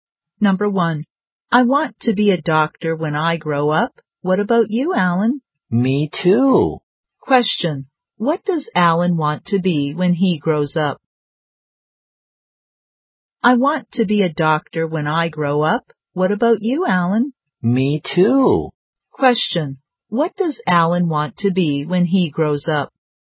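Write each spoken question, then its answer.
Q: what does Alan want to be when he grows up?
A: A doctor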